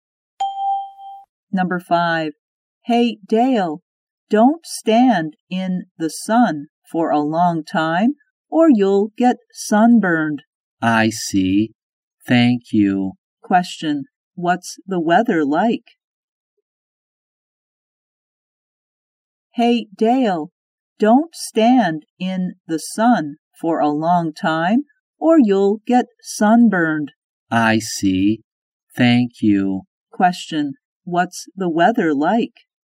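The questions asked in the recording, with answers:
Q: What's the weather like?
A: Sunny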